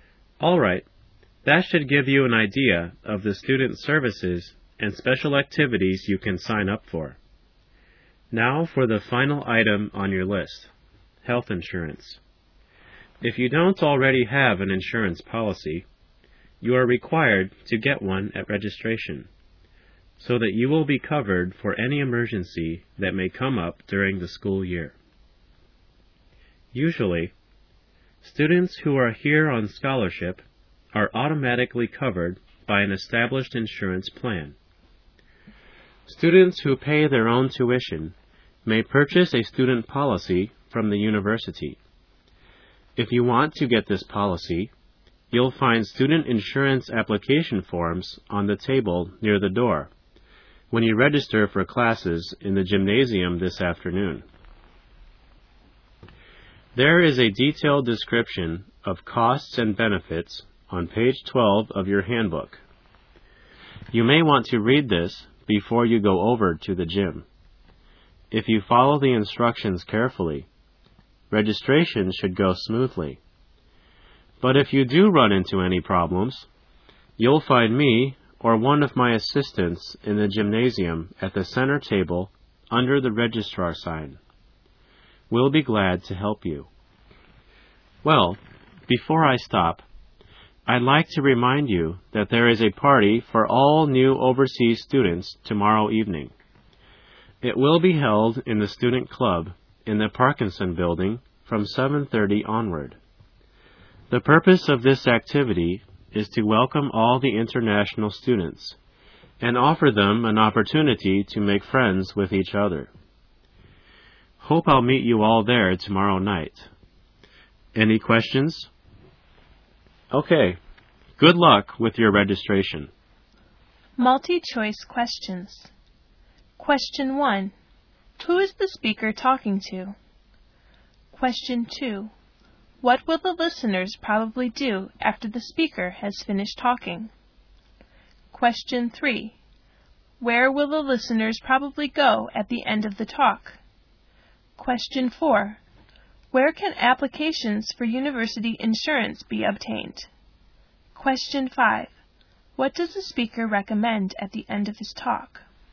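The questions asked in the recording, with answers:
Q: Who is the speaker talking to?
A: New overseas (international) students

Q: Where will the listeners probably go at the end of the talk?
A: To the gymnasium

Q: Where can applications for university insurance be obtained?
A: On the table near the door in the gymnasium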